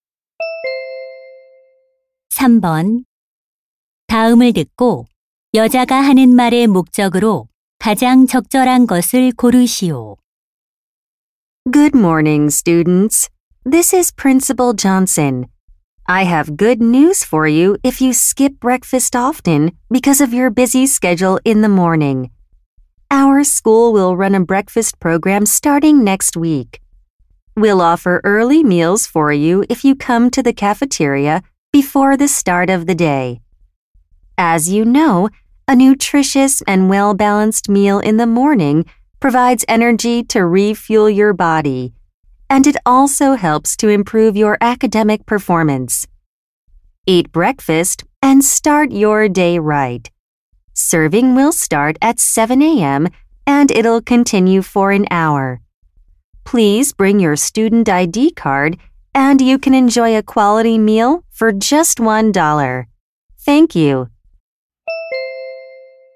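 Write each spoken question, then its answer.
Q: 다음을 듣고 여자가 하는 말의 목적으로 가장 적절한 것을 고르시오.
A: 학교 아침 식사 프로그램 시행을 알리려고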